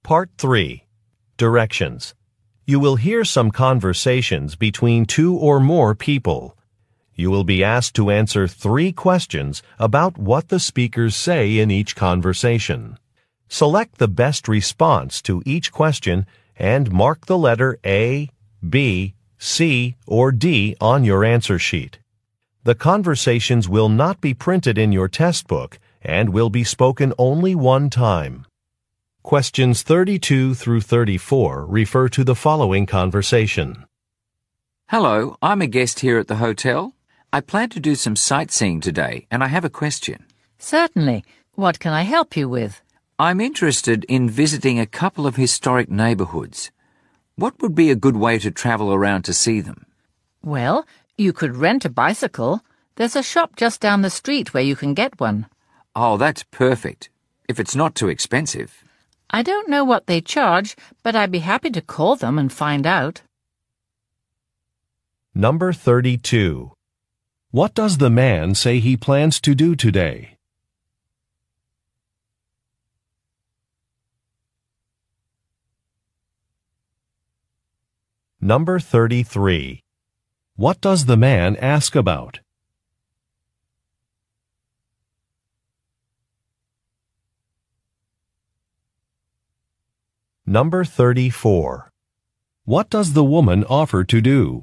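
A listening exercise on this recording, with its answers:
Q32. What does the man say he plans to do today?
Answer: Go sightseeing

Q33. What does the man ask about?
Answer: Transportation options

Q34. What does the woman offer to do?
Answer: Check on some prices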